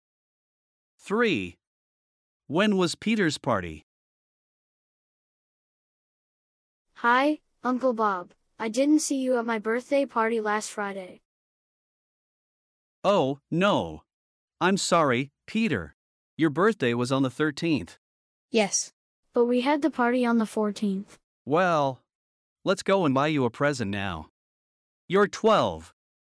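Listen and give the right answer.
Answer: On the 14th (last Friday)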